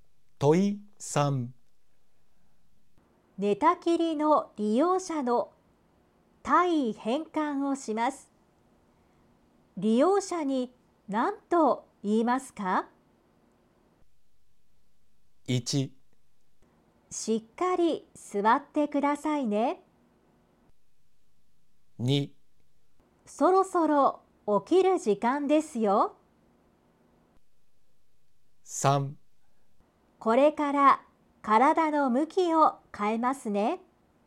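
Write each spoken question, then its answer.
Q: 寝たきりの利用者の体位変換をします。利用者に何と言いますか?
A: 3: これから体の向きを変えますね。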